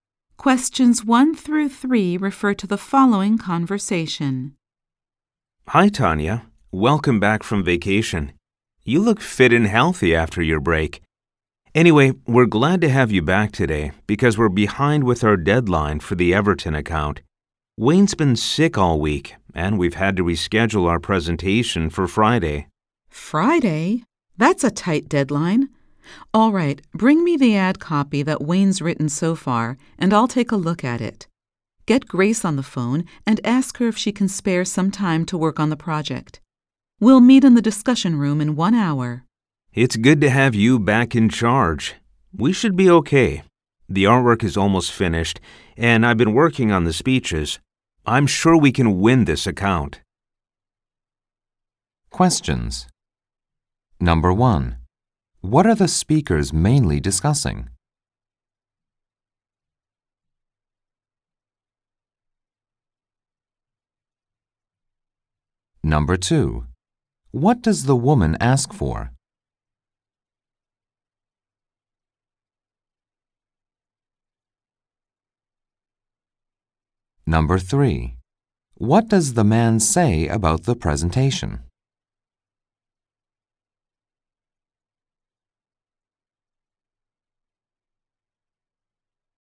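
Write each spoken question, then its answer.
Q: What are the speakers mainly discussing?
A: A presentation deadline for the Everton account

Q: What does the woman ask for?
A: The ad copy Wayne has written so far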